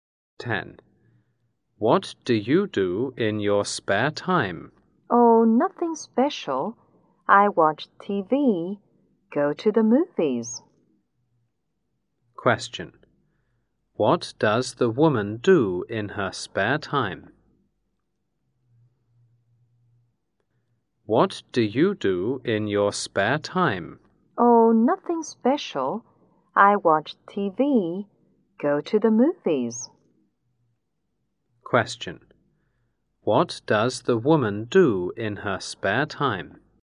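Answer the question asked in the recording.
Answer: She watches TV and goes to the movies.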